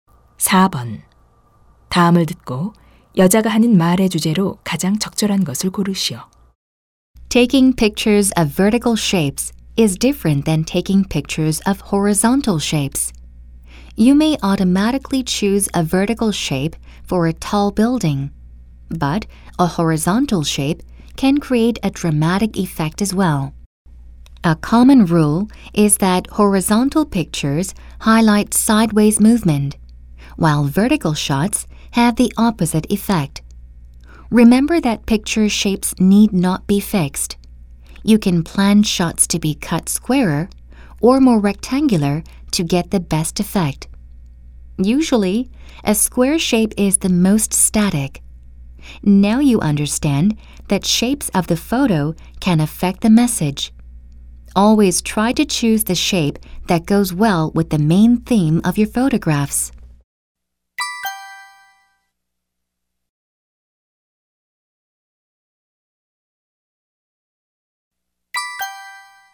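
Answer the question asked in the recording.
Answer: 사진의 모양(가로·세로)이 사진의 메시지에 미치는 영향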